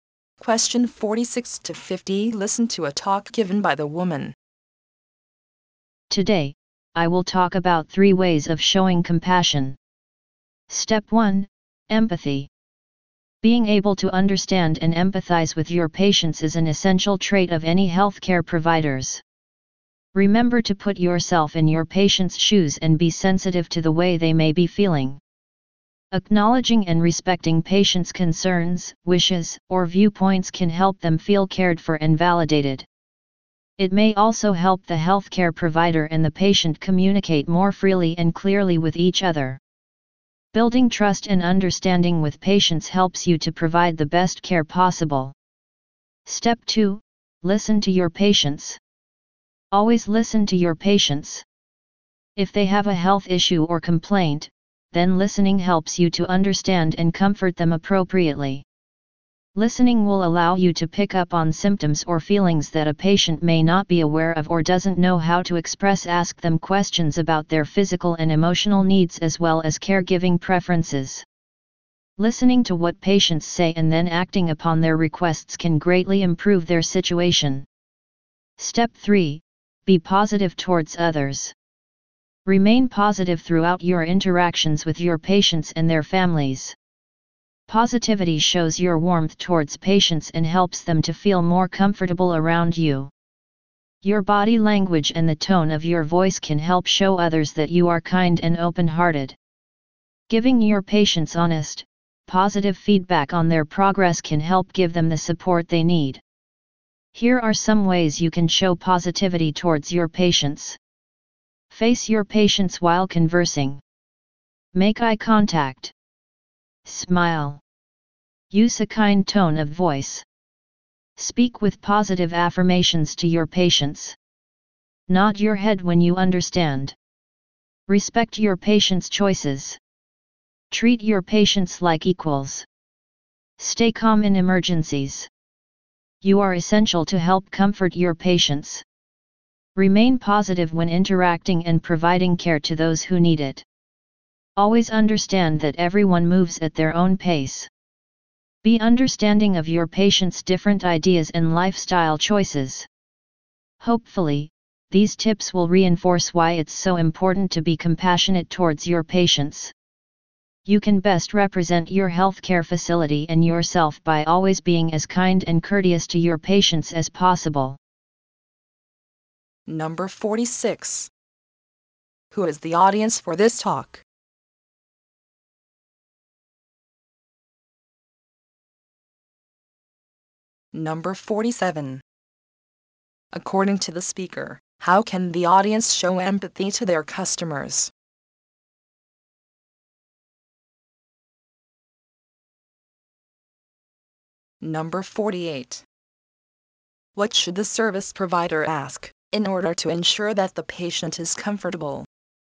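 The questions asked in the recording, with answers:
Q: Who is the audience for this talk?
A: Healthcare providers

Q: According to the speaker, how can the audience show empathy to their customers?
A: By putting themselves in the patients' shoes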